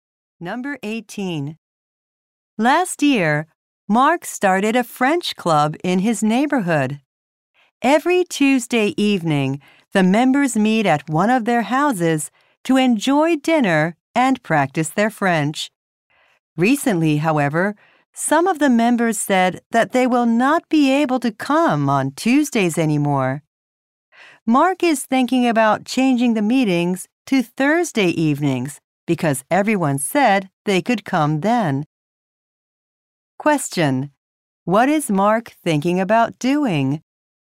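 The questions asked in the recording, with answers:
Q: What is Mark thinking about doing?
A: Changing the meetings to Thursday evenings.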